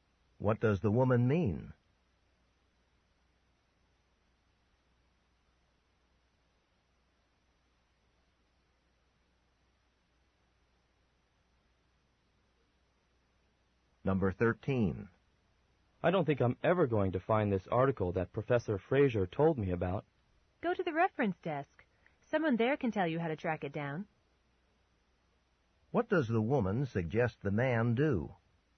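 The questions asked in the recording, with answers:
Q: What does the woman suggest the man do?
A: Ask at the reference desk.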